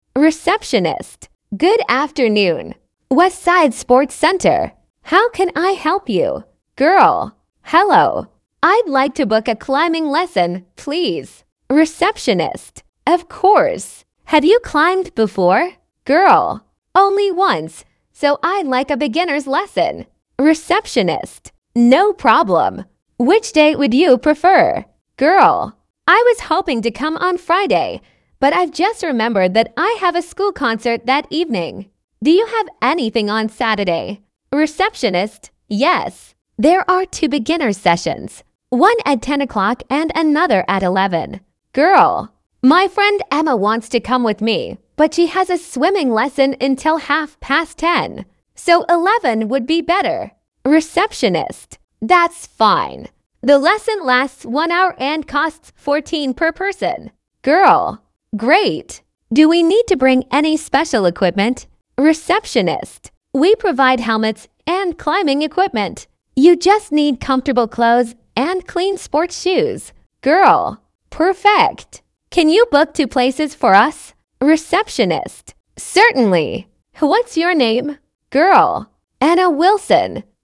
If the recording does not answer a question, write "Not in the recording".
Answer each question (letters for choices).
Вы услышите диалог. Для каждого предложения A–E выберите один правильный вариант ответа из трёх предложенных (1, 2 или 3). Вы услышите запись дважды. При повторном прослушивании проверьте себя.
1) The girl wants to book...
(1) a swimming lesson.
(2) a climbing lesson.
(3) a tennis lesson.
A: 2

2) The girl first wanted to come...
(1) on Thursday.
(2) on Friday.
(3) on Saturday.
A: 2

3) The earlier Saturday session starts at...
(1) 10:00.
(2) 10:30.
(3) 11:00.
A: 1

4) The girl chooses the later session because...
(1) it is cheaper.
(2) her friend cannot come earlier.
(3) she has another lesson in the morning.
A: 2

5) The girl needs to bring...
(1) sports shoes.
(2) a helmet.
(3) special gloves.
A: 1

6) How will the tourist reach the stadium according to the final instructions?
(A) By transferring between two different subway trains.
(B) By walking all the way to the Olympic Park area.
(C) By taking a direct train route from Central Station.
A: Not in the recording

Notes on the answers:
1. Девушка хочет записаться не на плавание, а на занятие по скалолазанию.
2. Изначально Анна хотела прийти в пятницу, но в этот день у неё школьный концерт.
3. Первое занятие в субботу начинается в 10:00.
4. Анна выбирает занятие в 11:00, потому что её подруга Эмма до 10:30 находится на тренировке по плаванию.
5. Шлем и другое снаряжение предоставляет спортивный центр, а с собой нужно принести чистую спортивную обувь.

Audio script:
Girl: Hello. I'd like to book a climbing lesson, please.
Receptionist: Of course. Have you climbed before?
Girl: Only once, so I'd like a beginners' lesson.
Receptionist: No problem. Which day would you prefer?
Girl: I was hoping to come on Friday, but I've just remembered that I have a school concert that evening. Do you have anything on Saturday?
Receptionist: Yes. There are two beginners' sessions: one at ten o'clock and another at eleven.
Girl: My friend Emma wants to come with me, but she has a swimming lesson until half past ten. So eleven would be better.
Receptionist: That's fine. The lesson lasts one hour and costs £14 per person.
Girl: Great. Do we need to bring any special equipment?
Receptionist: We provide helmets and climbing equipment. You just need comfortable clothes and clean sports shoes.
Girl: Perfect. Can you book two places for us?
Receptionist: Certainly. What's your name?
Girl: Anna Wilson.